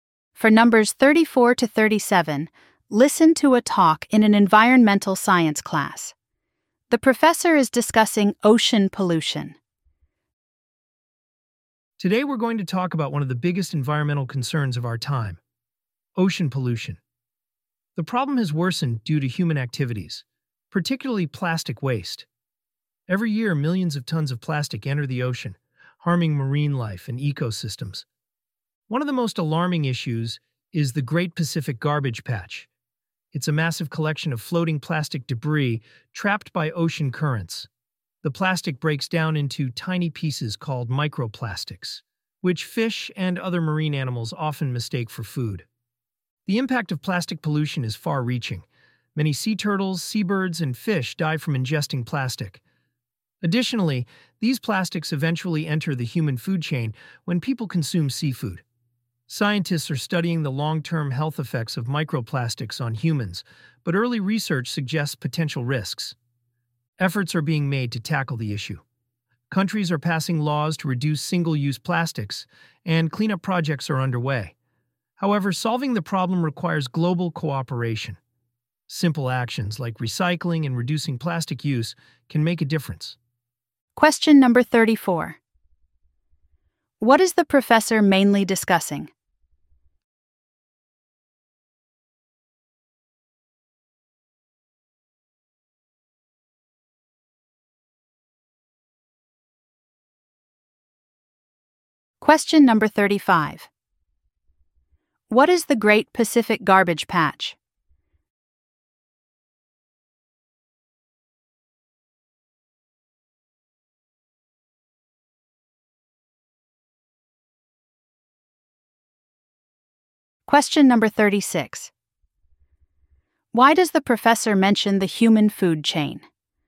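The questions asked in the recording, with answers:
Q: What is the professor mainly discussing?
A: Ocean pollution

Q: What is the Great Pacific Garbage Patch?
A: A massive collection of floating plastic debris trapped by ocean currents

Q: Why does the professor mention the human food chain?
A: Plastics reach humans when they eat seafood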